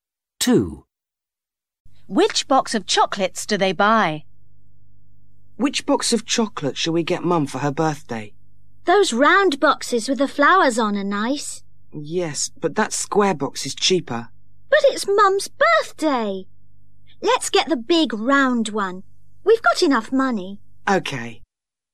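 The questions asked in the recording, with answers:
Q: Which box of chocolates do they buy?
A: The big round box with flowers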